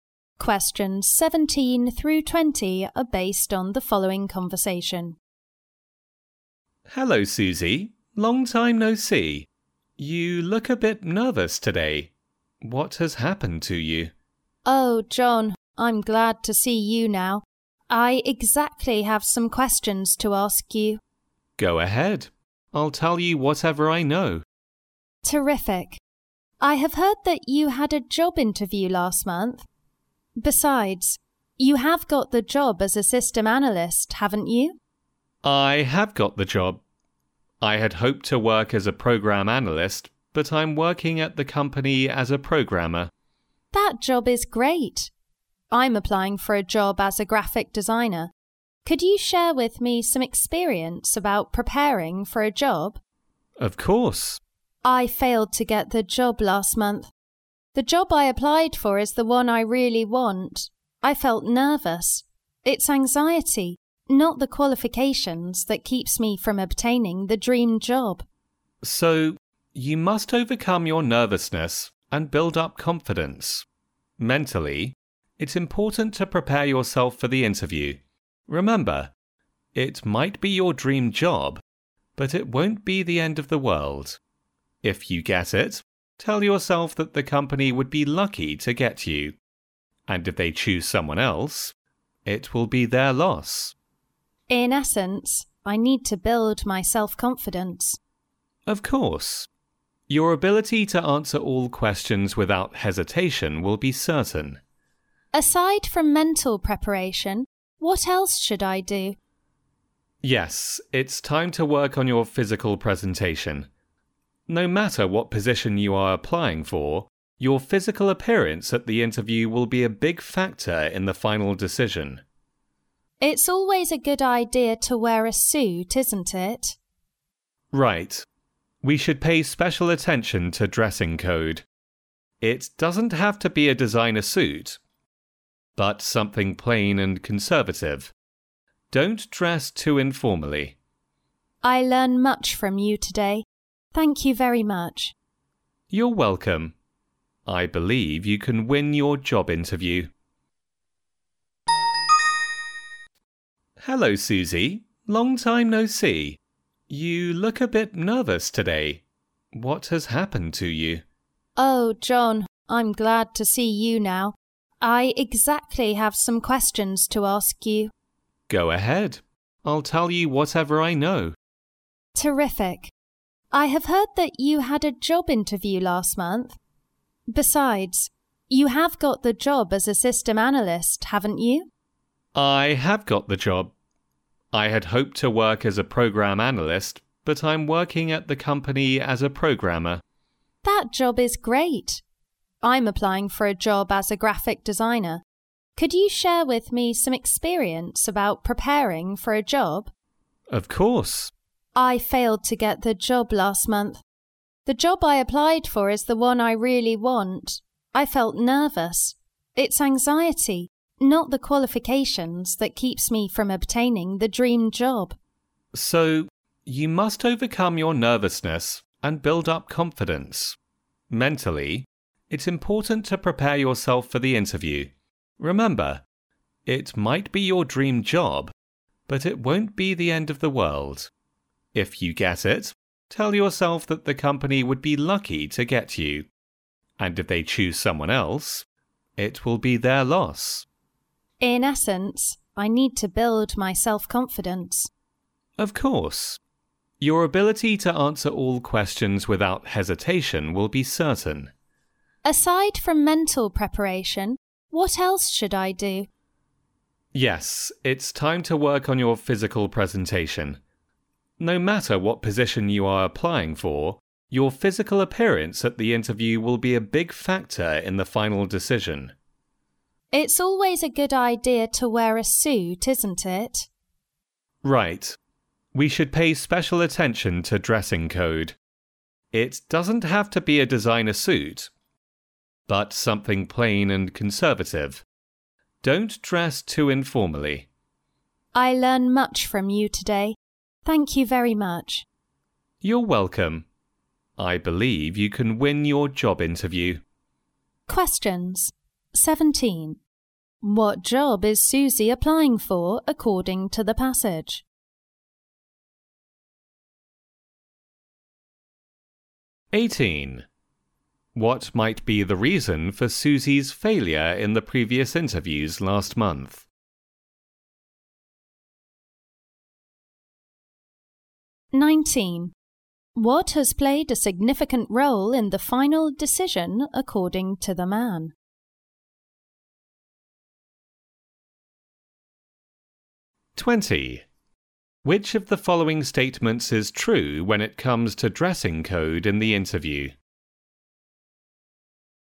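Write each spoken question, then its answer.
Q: What has played a significant role in the final decision, according to the man?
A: Physical appearance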